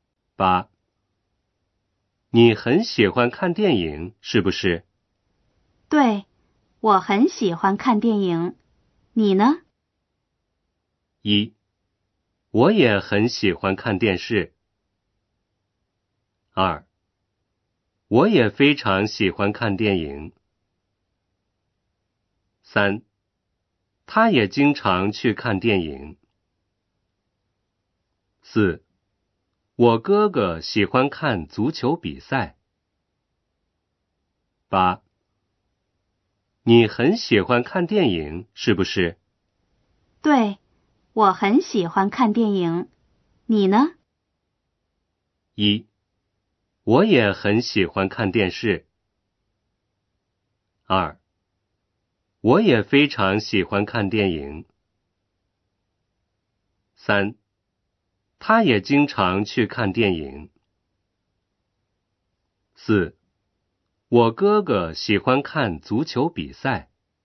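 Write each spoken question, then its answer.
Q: 你很喜欢看电影,是不是?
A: 二: 我也非常喜欢看电影。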